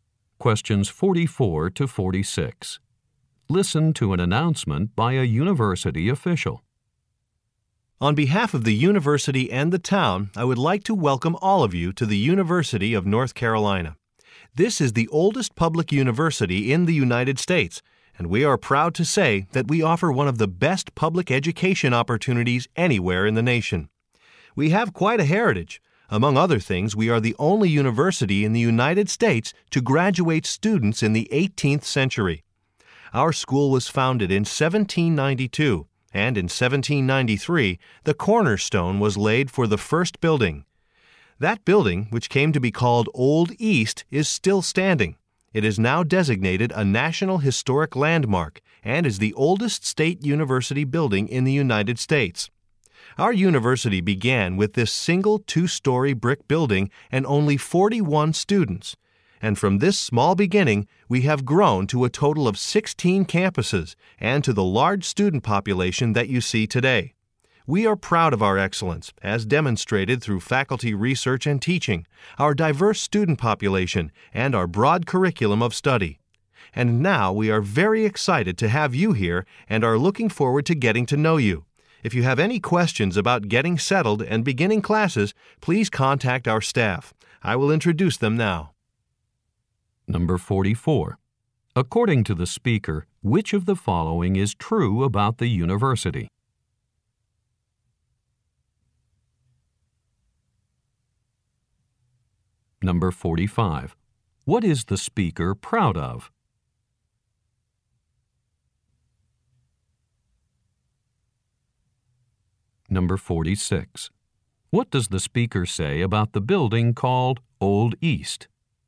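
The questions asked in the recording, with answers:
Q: What does the speaker say about the building called Old East?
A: It is still standing and is a National Historic Landmark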